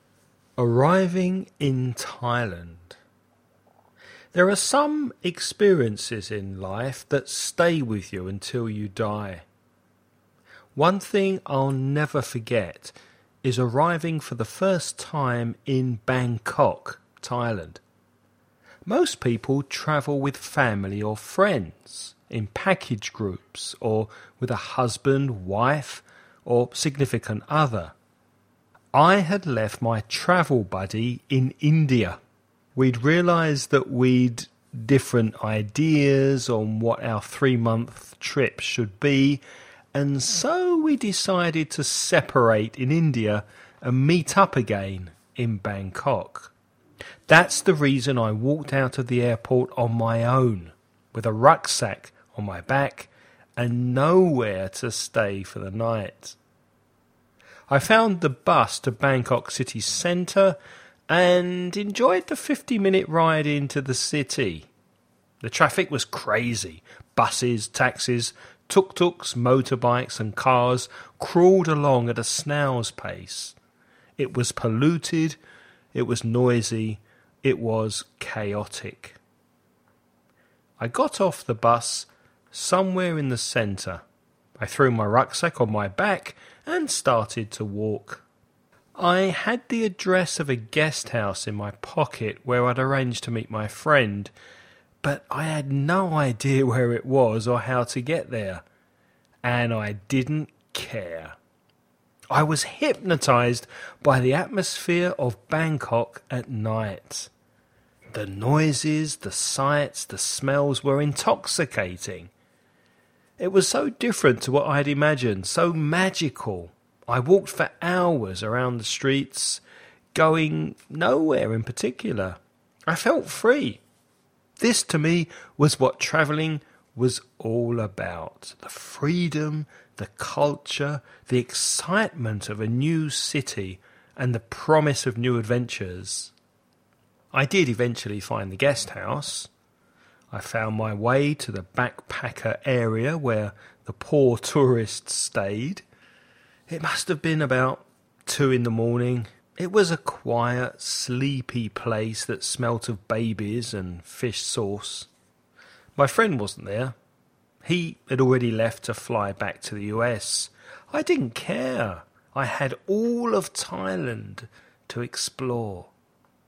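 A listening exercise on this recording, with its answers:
Listen and write the questions you hear.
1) Which country had the man visited before Thailand?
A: India

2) What mode of transport did the man use to get to the city centre?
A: A bus

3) What time did the man finally arrive at the guesthouse?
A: About 2 in the morning

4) What did the guesthouse smell of?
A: Babies and fish sauce

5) Did the speaker meet his friend in Bangkok?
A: No, his friend had already left for the US

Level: nivel avanzado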